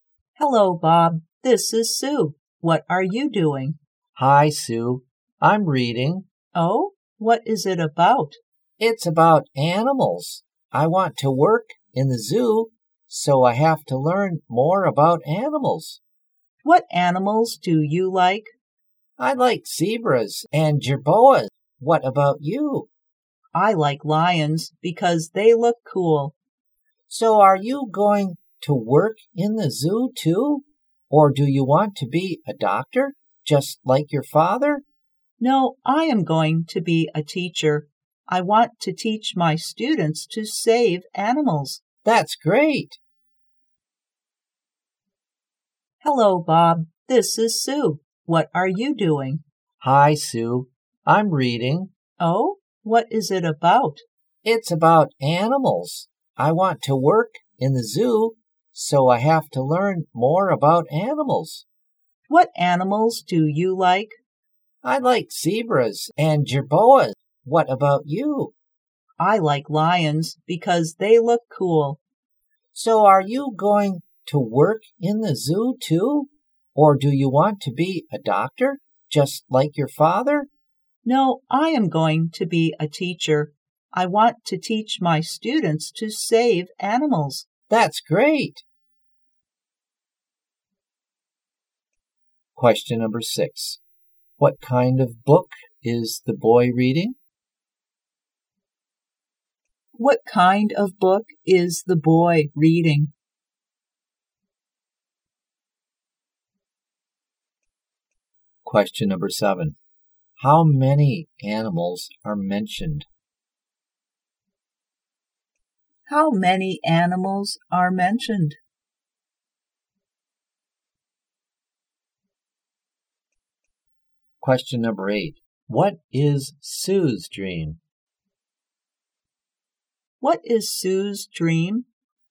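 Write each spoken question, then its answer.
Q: What kind of book is the boy reading?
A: A book about animals.

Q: What is Sue's dream?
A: To be a teacher.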